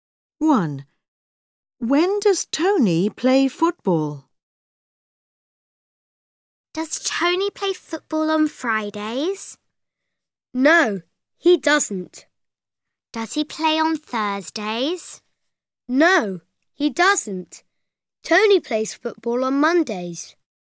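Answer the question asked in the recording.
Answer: On Mondays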